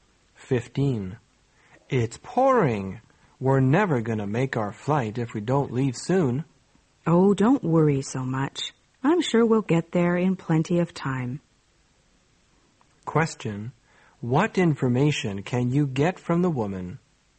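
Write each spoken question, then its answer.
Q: What information can you get from the woman?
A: She thinks they will get to the flight in plenty of time.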